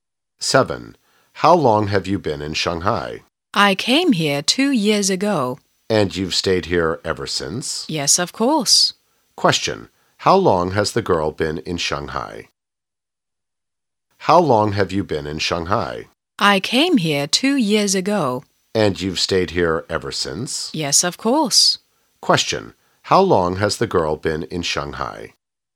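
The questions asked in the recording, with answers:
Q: How long has the girl been in Shanghai?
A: For two years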